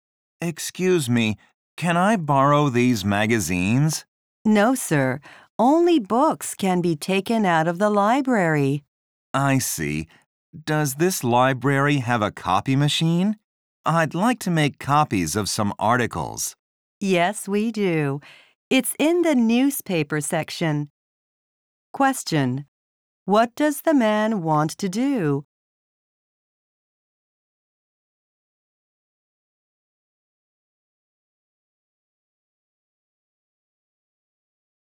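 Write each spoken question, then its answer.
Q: What does the man want to do?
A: Make copies of some magazine articles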